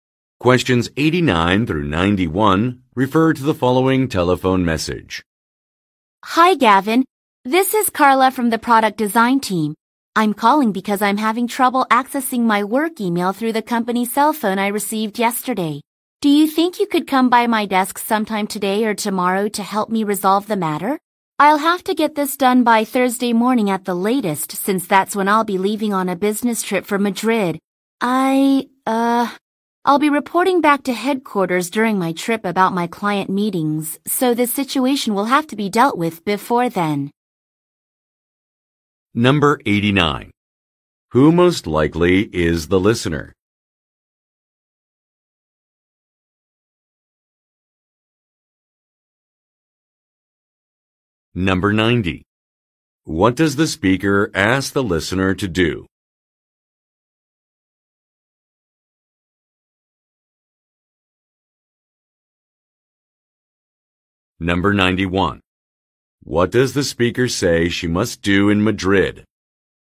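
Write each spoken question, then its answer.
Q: What does the speaker ask the listener to do?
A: Come by her desk to help her access her work email on her company phone

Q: What does the speaker say she must do in Madrid?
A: Report back to headquarters about her client meetings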